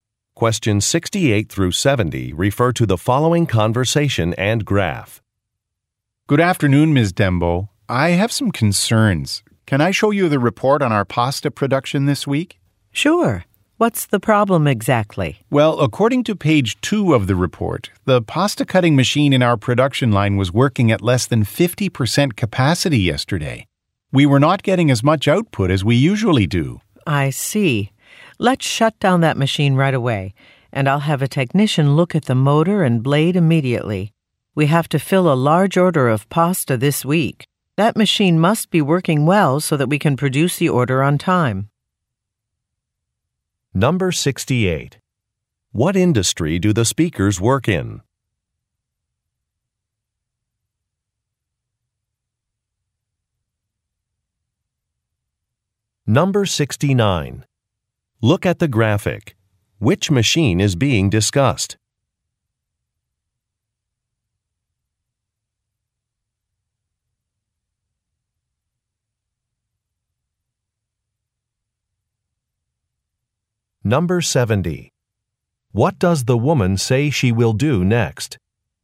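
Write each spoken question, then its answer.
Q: What industry do the speakers work in?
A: Food production (pasta manufacturing)

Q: What does the woman say she will do next?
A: Shut down the machine and have a technician inspect it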